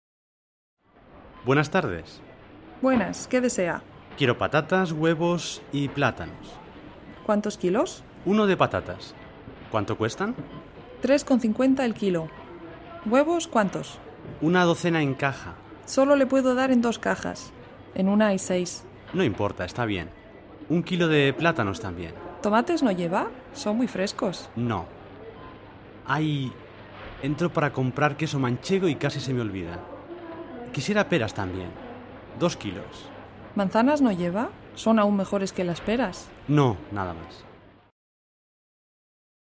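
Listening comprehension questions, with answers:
Écris V si c'est vrai et F si c'est faux.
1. Compra un kilo de patatas por 3,55 euros.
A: F

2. Entra para comprar queso manchego.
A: V

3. Compra seis huevos.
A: F

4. Compra manzanas.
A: F

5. Compra peras.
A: V

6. Compra plátanos.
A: V

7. Compra tomates.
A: F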